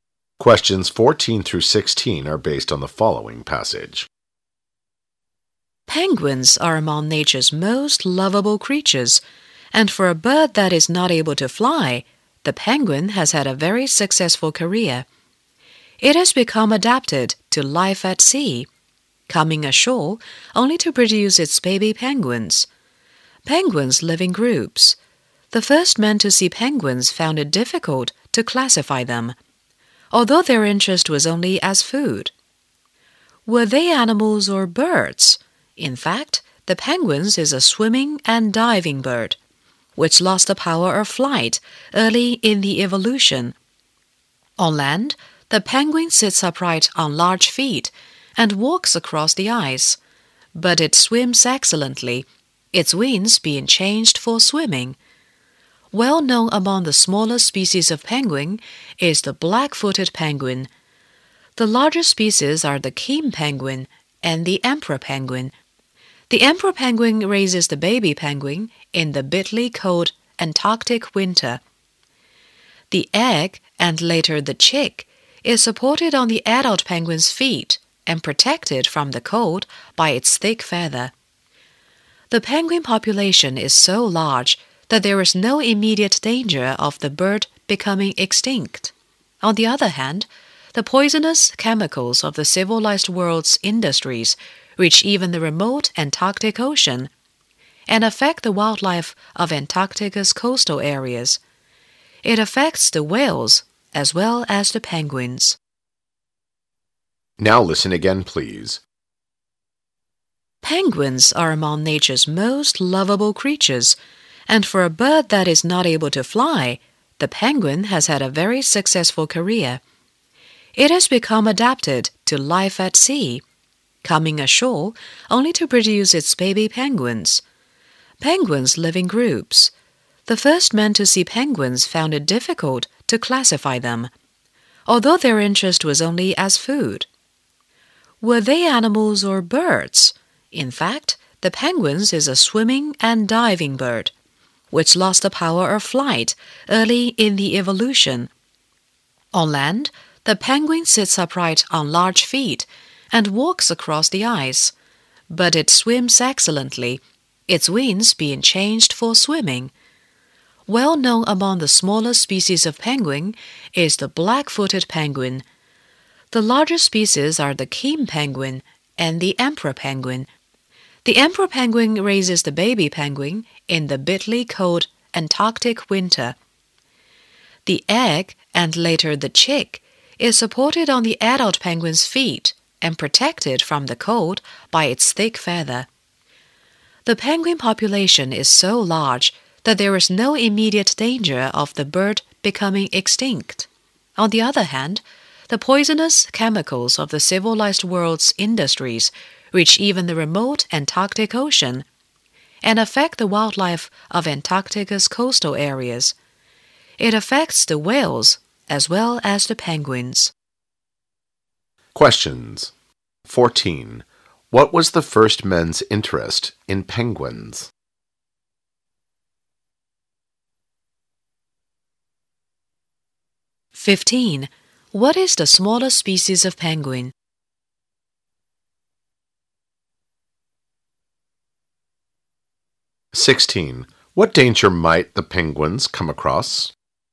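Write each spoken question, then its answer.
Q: What was the first men's interest in penguins?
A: Food

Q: What danger might the penguins come across?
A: Poisonous chemicals from industry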